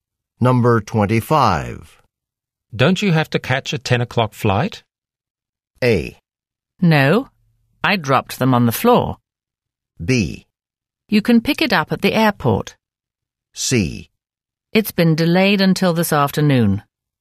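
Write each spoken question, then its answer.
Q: Don't you have to catch a 10 o'clock flight?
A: C: It's been delayed until this afternoon.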